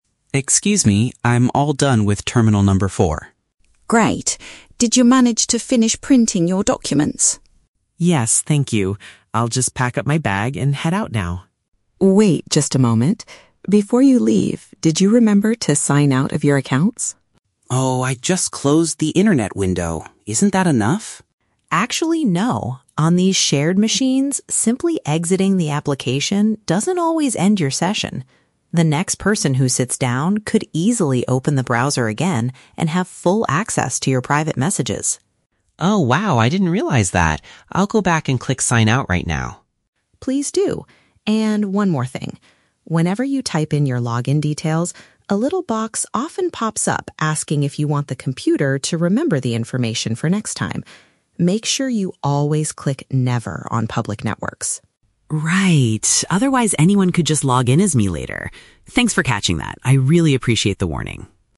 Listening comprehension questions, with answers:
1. Why does the librarian stop the man from leaving?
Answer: She wants to ensure his personal information remains secure.

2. What mistake did the man make before talking to the librarian?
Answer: He assumed that exiting the application was sufficient to protect his account.

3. What is the librarian's advice regarding the pop-up message?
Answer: Decline the offer to store his login credentials on the device.

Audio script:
Reader: Excuse me, I'm all done with terminal number four.
Librarian: Great. Did you manage to finish printing your documents?
Reader: Yes, thank you. I'll just pack up my bag and head out now.
Librarian: Wait just a moment. Before you leave, did you remember to sign out of your accounts?
Reader: Oh, I just closed the internet window. Isn't that enough?
Librarian: Actually, no. On these shared machines, simply exiting the application doesn't always end your session. The next person who sits down could easily open the browser again and have full access to your private messages.
Reader: Oh wow, I didn't realize that. I'll go back and click "sign out" right now.
Librarian: Please do. And one more thing: whenever you type in your login details, a little box often pops up asking if you want the computer to remember the information for next time. Make sure you always click "never" on public networks.
Reader: Right, otherwise anyone could just log in as me later. Thanks for catching that, I really appreciate the warning!